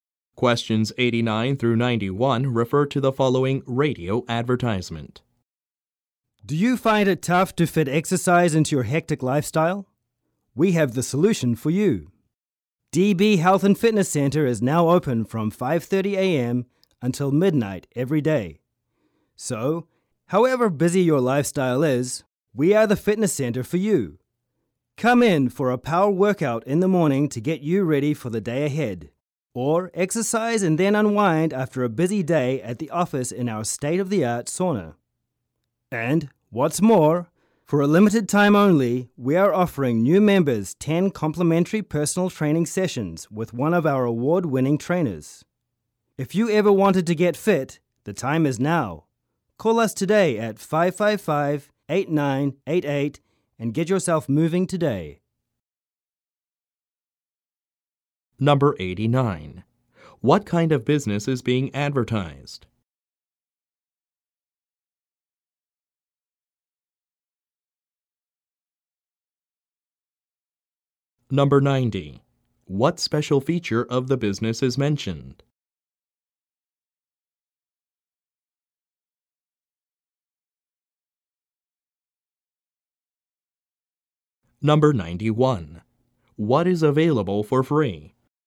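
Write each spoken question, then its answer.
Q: What kind of business is being advertised?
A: A fitness center

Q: What is available for free?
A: 10 personal training sessions for new members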